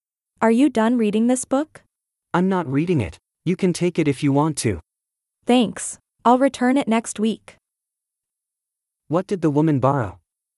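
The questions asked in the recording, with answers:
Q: What did the woman borrow?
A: A book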